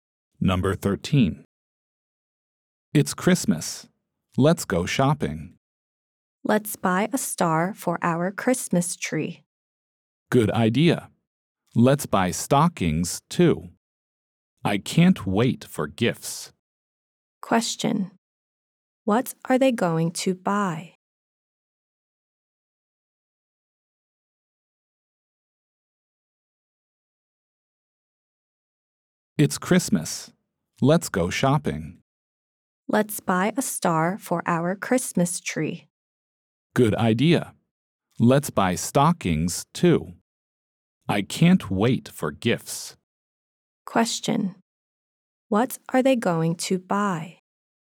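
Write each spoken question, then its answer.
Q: What are they going to buy?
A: A star and stockings.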